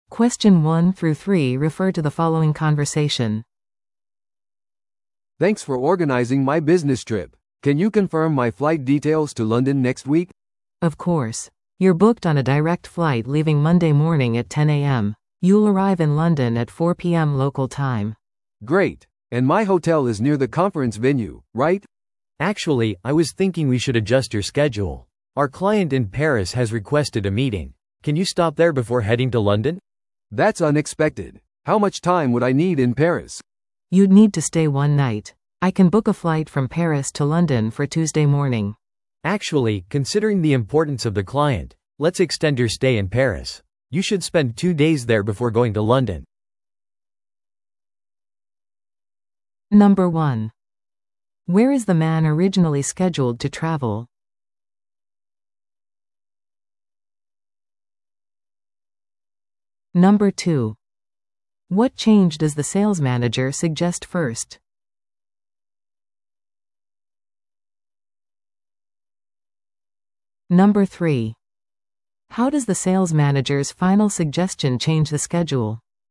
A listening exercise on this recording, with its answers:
Listen to the audio below and answer the questions.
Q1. Where is the man originally scheduled to travel?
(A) パリ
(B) ロンドン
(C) ニューヨーク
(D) 東京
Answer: ロンドン

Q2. What change does the sales manager suggest first?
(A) 出張をキャンセルする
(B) ロンドンの前にパリに立ち寄る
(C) ロンドンでの滞在を延長する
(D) 出張を翌週に延期する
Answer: ロンドンの前にパリに立ち寄る

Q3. How does the sales manager's final suggestion change the schedule?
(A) 出張が延期された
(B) パリでの滞在が延長された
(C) ロンドンでの会議がキャンセルされた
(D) パリでの会議がスキップされた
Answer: パリでの滞在が延長された

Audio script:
A: "Thanks for organizing my business trip. Can you confirm my flight details to London next week?"
B: "Of course! You're booked on a direct flight leaving Monday morning at 10 AM. You'll arrive in London at 4 PM local time."
A: "Great. And my hotel is near the conference venue, right?"
C: "Actually, I was thinking we should adjust your schedule. Our client in Paris has requested a meeting. Can you stop there before heading to London?"
A: "That's unexpected. How much time would I need in Paris?"
B: "You'd need to stay one night. I can book a flight from Paris to London for Tuesday morning."
C: "Actually, considering the importance of the client, let's extend your stay in Paris. You should spend two days there before going to London."

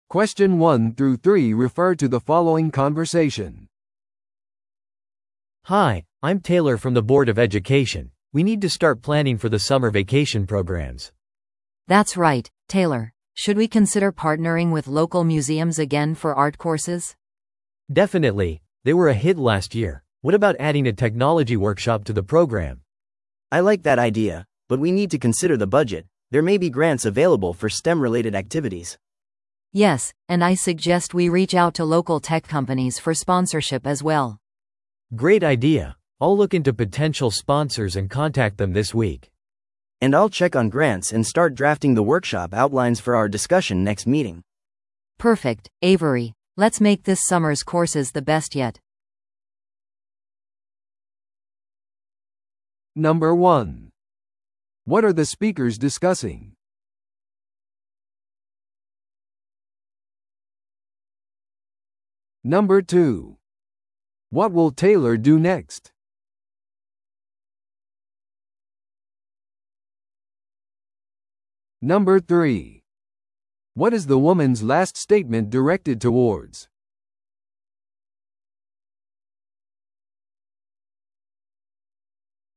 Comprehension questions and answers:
Listen to the audio below and answer the questions.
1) What are the speakers discussing?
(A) 夏のプログラムの場所を選ぶこと。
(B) 教育活動のための予算案を作成すること。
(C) 生徒たちのための夏休みのコースを企画すること。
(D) 地元企業のための技術展示会を準備すること。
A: 生徒たちのための夏休みのコースを企画すること。

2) What will Taylor do next?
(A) コースの承認のために地元の美術館を訪れる。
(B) 潜在的なスポンサーに連絡を取る。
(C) 生徒を美術コースに登録する。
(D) STEM活動のための資金集めのキャンペーンを始める。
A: 潜在的なスポンサーに連絡を取る。

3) What is the woman's last statement directed towards?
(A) テクノロジーワークショップの予算を確定する。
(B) テクノロジー企業とのフォローアップミ-ティングを提案する。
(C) 地元の美術館との提携を最終決定する。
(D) 夏のコースの成功を確実にする。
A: 夏のコースの成功を確実にする。

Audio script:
A: Hi, I'm Taylor from the board of education. We need to start planning for the summer vacation programs.
B: That's right, Taylor. Should we consider partnering with local museums again for art courses?
A: Definitely. They were a hit last year. What about adding a technology workshop to the program?
C: I like that idea. But we need to consider the budget. There may be grants available for STEM-related activities.
B: Yes, and I suggest we reach out to local tech companies for sponsorship as well.
A: Great idea! I'll look into potential sponsors and contact them this week.
C: And I'll check on grants and start drafting the workshop outlines for our discussion next meeting.
B: Perfect, Avery. Let's make this summer's courses the best yet.

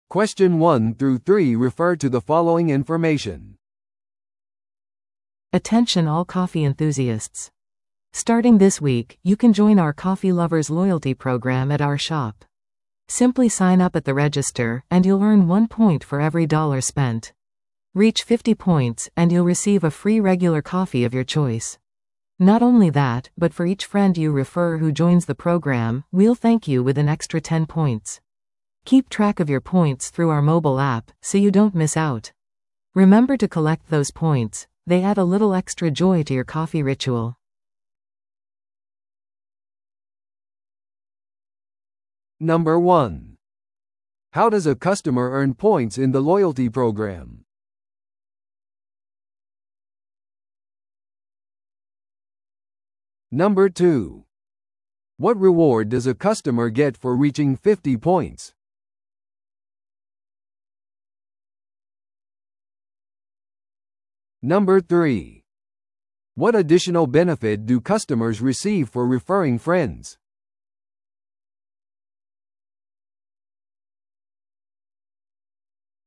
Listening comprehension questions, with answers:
Listen to the audio below and answer the questions.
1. How does a customer earn points in the loyalty program?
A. コーヒーショップに滞在する時間によって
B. ショップにいる分ごとに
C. 費やしたドルごとに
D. コーヒーショップをオンラインで評価することによって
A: 費やしたドルごとに

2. What reward does a customer get for reaching 50 points?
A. 次回購入時に50%の割引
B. コーヒーマグ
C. 無料のペイストリー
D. 無料のレギュラーコーヒー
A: 無料のレギュラーコーヒー

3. What additional benefit do customers receive for referring friends?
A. 無料Wi-Fiアクセス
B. 10ポイントの追加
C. パーソナルバリスタクラス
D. ロイヤリティプログラムメンバーシップの延長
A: 10ポイントの追加

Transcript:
Attention all coffee enthusiasts! Starting this week, you can join our Coffee Lovers Loyalty Program at our shop. Simply sign up at the register, and you'll earn one point for every dollar spent. Reach 50 points, and you'll receive a free regular coffee of your choice. Not only that, but for each friend you refer who joins the program, we'll thank you with an extra ten points. Keep track of your points through our mobile app, so you don't miss out. Remember to collect those points; they add a little extra joy to your coffee ritual!

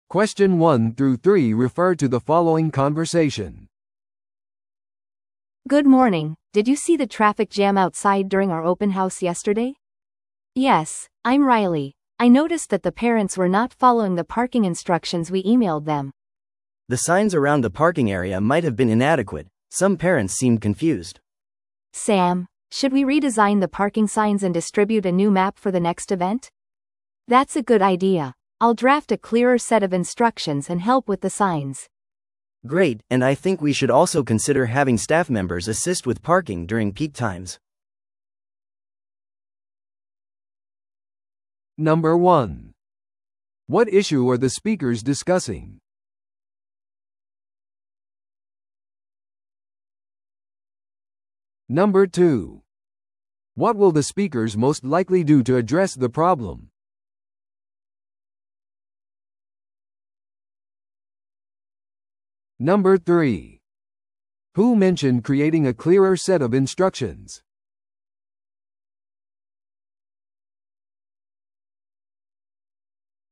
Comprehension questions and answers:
Listen to the audio below and answer the questions.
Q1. What issue are the speakers discussing?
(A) 公開日に提供されたスナックの質。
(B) 公開日イベント中の交通問題。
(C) 教室の場所を示す看板が不十分であること。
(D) イベント登録時のスタッフ不足。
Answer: 公開日イベント中の交通問題。

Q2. What will the speakers most likely do to address the problem?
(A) 保護者に謝罪の手紙を送る。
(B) 駐車場の標識を再設計し、新しい地図を提供する。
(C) 次回の公開日イベントをキャンセルする。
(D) プロの交通コーディネーターを雇う。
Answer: 駐車場の標識を再設計し、新しい地図を提供する。

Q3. Who mentioned creating a clearer set of instructions?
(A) 自己紹介でライリーと名乗った話者。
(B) 会話で最初に話した話者。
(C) サムと名乗った人。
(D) イベントに参加している保護者の1人。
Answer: 自己紹介でライリーと名乗った話者。

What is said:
A: Good morning, did you see the traffic jam outside during our open house yesterday?
C: Yes, I'm Riley. I noticed that the parents were not following the parking instructions we emailed them.
B: The signs around the parking area might have been inadequate. Some parents seemed confused.
A: Sam, should we redesign the parking signs and distribute a new map for the next event?
C: That's a good idea. I'll draft a clearer set of instructions and help with the signs.
B: Great, and I think we should also consider having staff members assist with parking during peak times.

